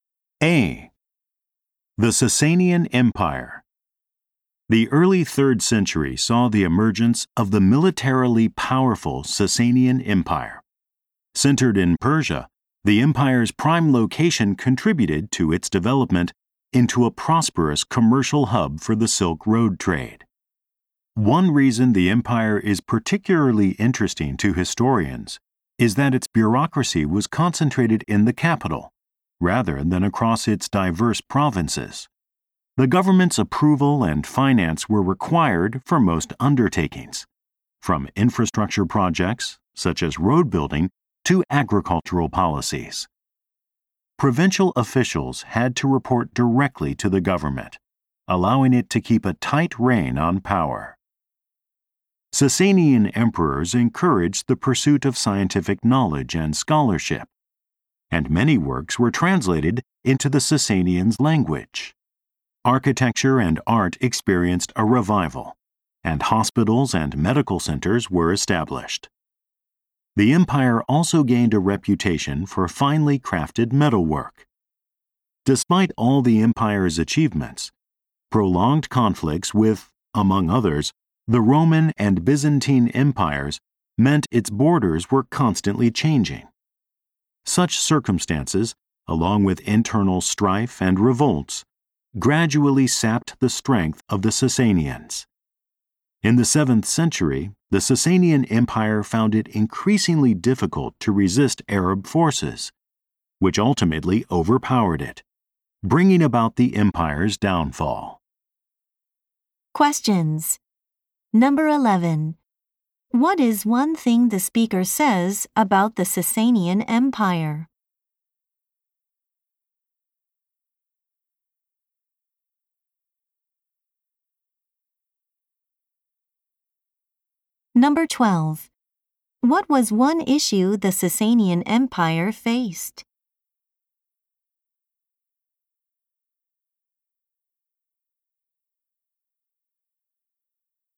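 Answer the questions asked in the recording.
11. Its bureaucracy was concentrated in the capital, not the provinces.
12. Long conflicts with other empires kept changing its borders, and there was strife inside the empire.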